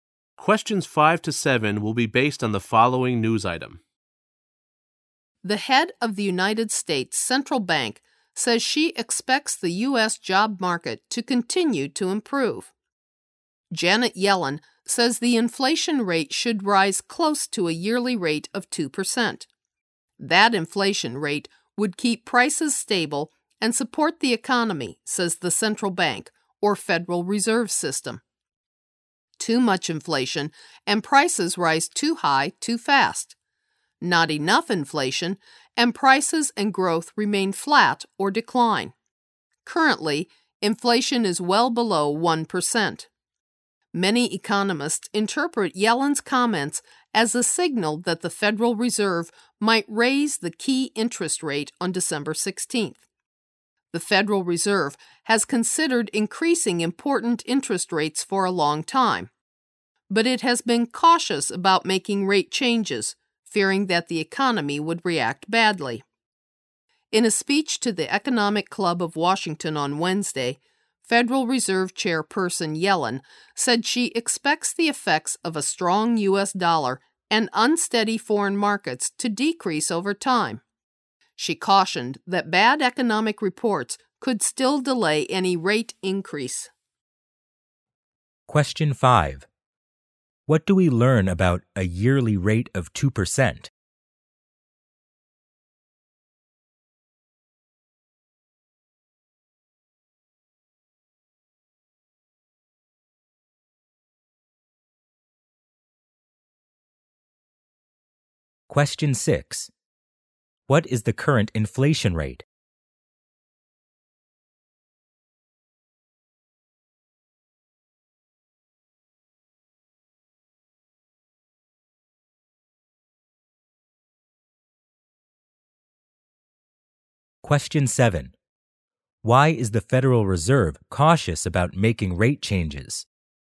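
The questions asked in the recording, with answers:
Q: What do we learn about a yearly rate of 2%?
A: That inflation rate would keep prices stable and support the economy.

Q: What is the current inflation rate?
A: Well below 1%.

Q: Why is the Federal Reserve cautious about making rate changes?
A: It fears the economy would react badly.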